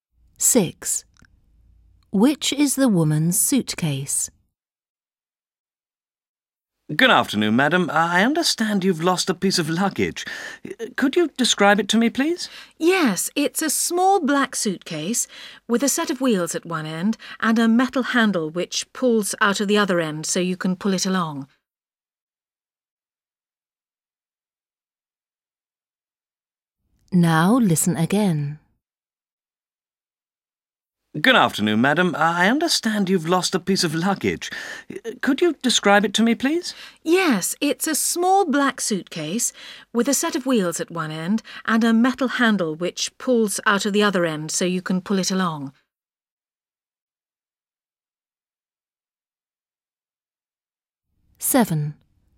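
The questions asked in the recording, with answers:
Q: Which is the woman's suitcase?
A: a small black suitcase with wheels at one end and a pull-out metal handle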